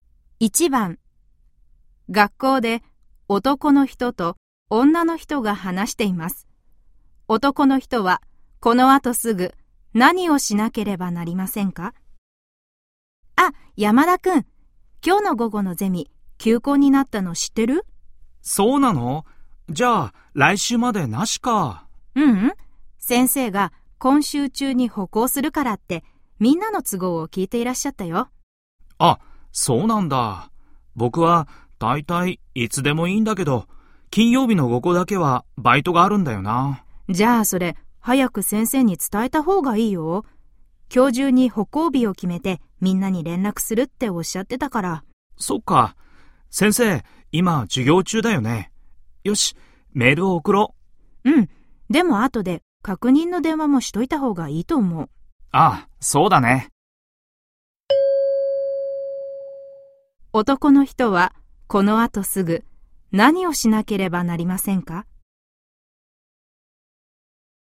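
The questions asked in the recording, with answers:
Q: 男の人はこの後すぐ何をしなければなりませんか?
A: 先生にメールを送る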